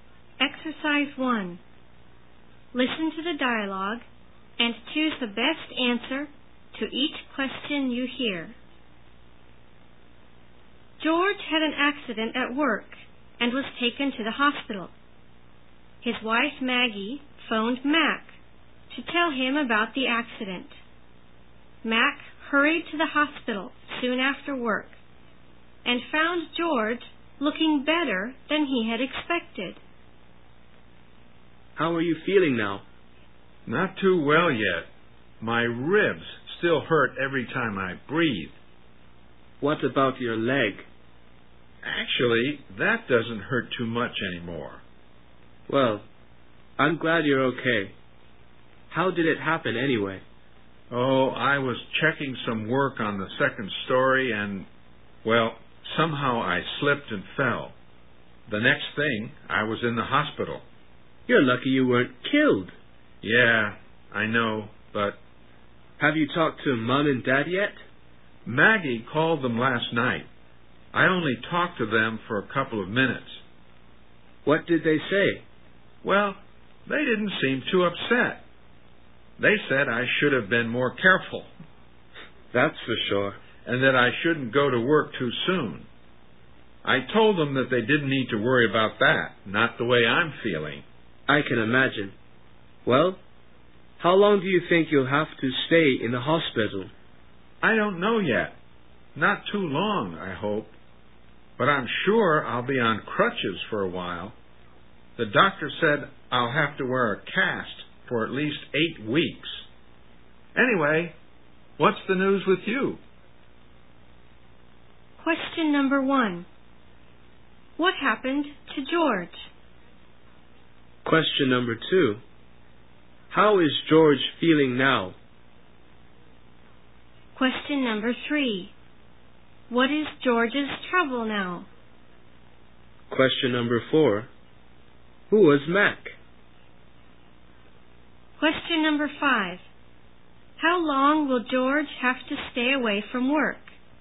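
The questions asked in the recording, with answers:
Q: What happened to George?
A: He slipped and fell while checking work on the second story and was taken to hospital.

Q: How is George feeling now?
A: Not too well yet; his ribs still hurt when he breathes.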